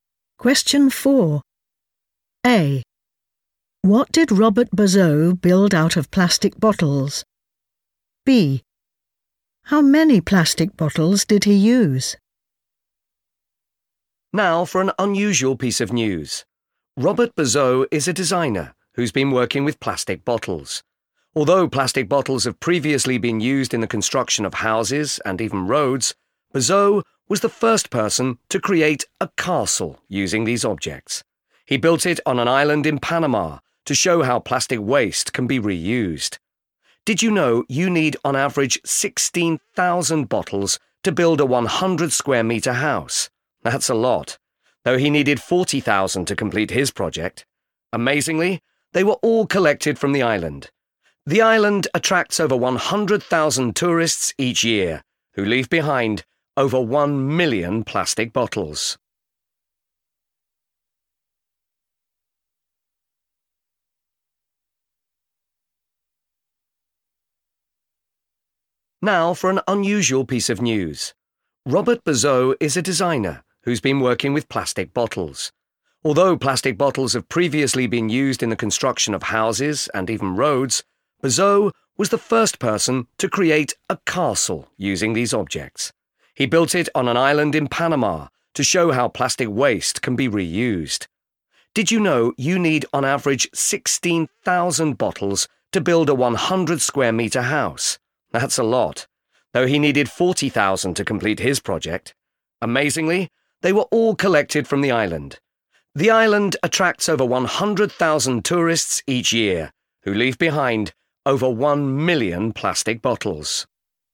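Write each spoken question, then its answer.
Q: What did Robert Bazot build out of plastic bottles?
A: a castle

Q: How many plastic bottles did he use?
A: 40,000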